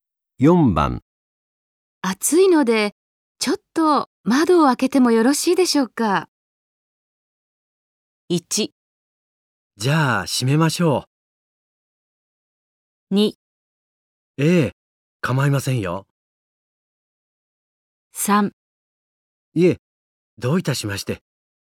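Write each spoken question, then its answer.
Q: 暑いので、ちょっと窓を開けてもよろしいでしょうか?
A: 2: ええ、構いませんよ。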